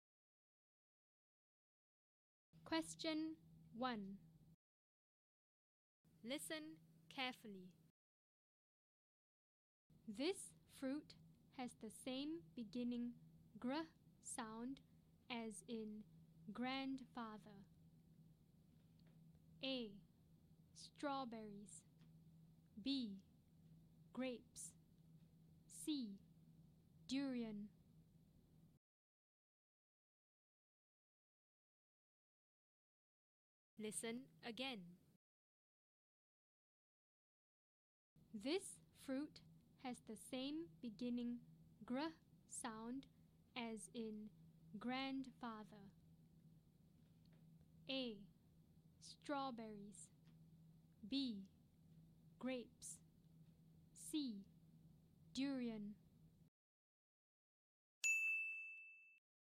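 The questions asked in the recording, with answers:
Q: This fruit has the same beginning gr sound as in grandfather.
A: B: Grapes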